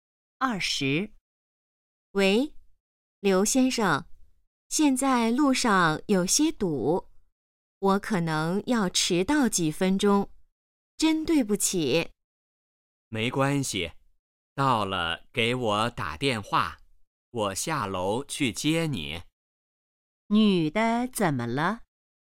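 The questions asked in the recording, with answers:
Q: 女的怎么了?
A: 可能要迟到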